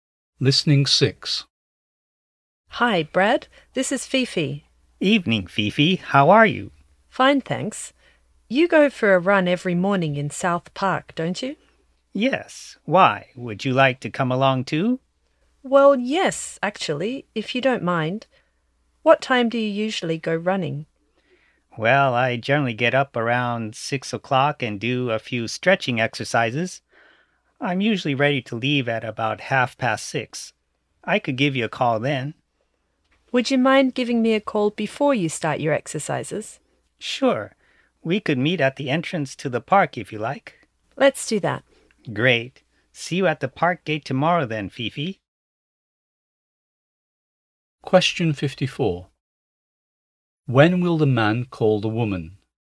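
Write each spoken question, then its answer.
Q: When will the man call the woman?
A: Around 6 o'clock, before his stretching exercises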